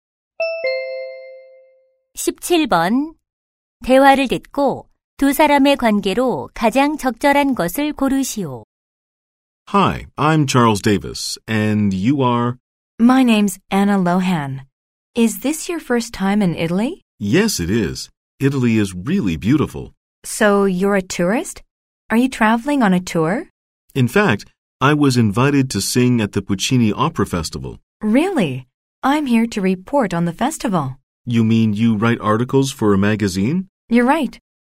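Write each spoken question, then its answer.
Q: 대화를 듣고 두 사람의 관계로 가장 적절한 것을 고르시오.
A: 가수와 기자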